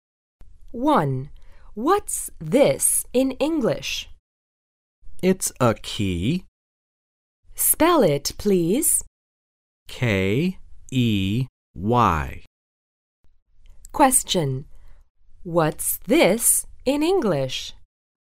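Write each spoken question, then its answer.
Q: What's this in English?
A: A key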